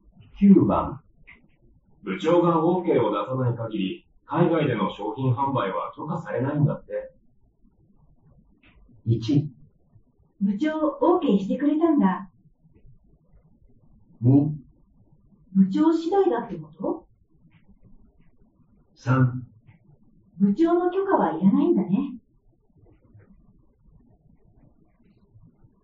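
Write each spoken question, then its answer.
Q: 部長が OK を出さない限り、海外での商品販売は許可されないんだって。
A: 2: 部長次第だってこと?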